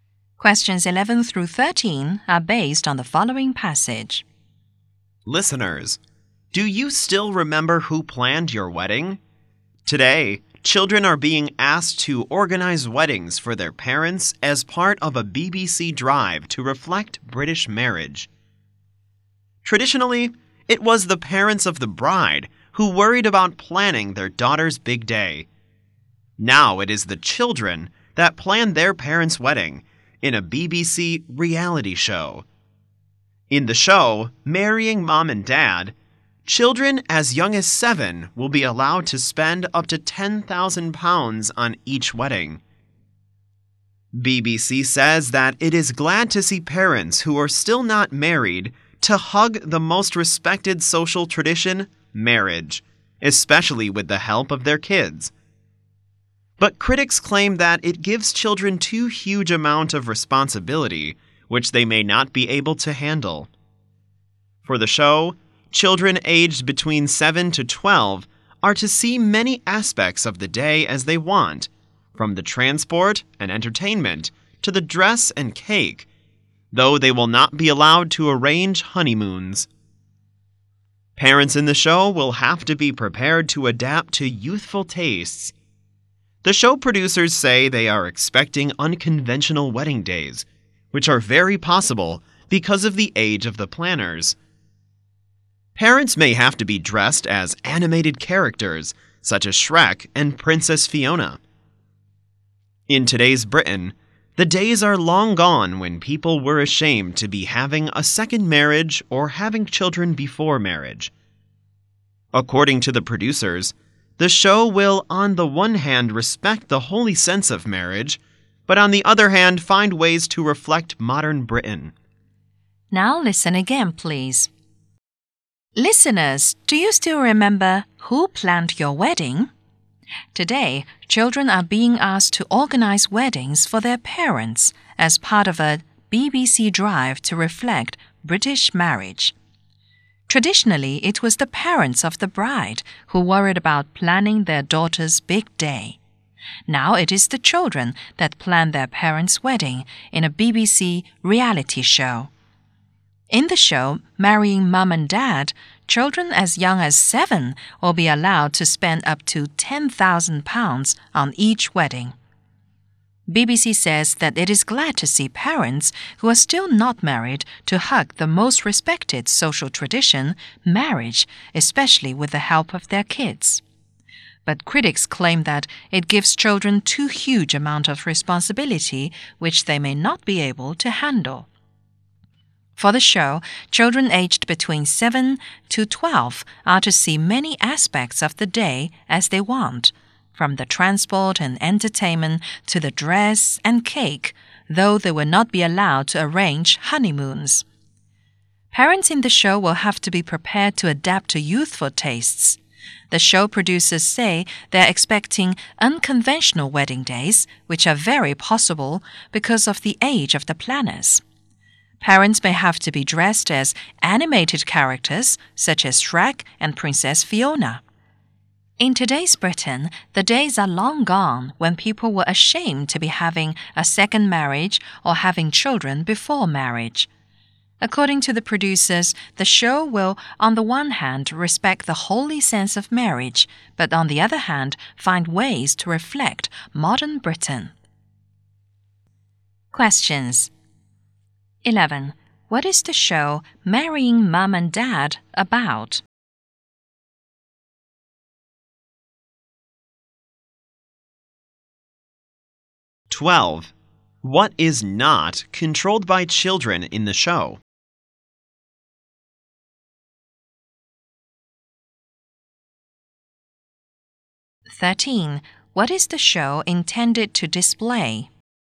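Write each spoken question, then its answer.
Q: What is the show Marrying Mum and Dad about?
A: Children planning their parents' weddings

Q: What is not controlled by children in the show?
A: Honeymoons

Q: What is the show intended to display?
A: Modern Britain, while respecting the holy sense of marriage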